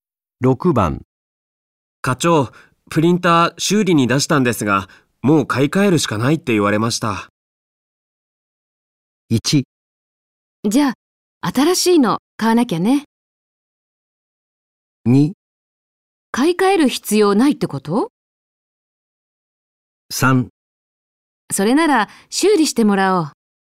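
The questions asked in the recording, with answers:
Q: 課長、プリンター修理に出したんですが、もう買い替えるしかないって言われました。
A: 1: じゃあ、新しいの買わなきゃね。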